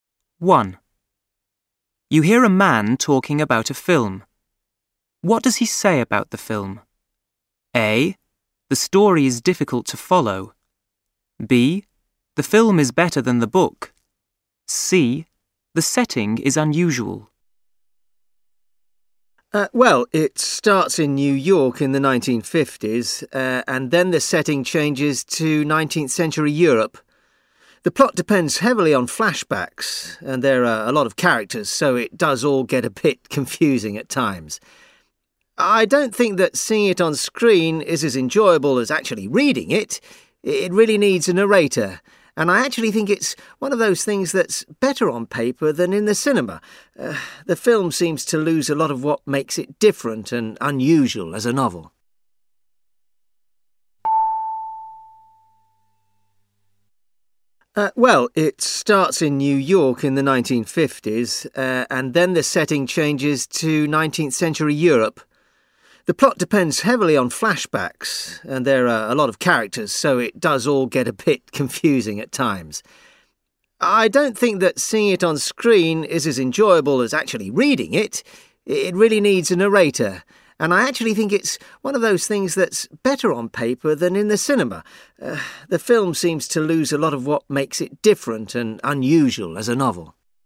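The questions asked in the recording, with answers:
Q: What does he say about the film?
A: A: The story is difficult to follow.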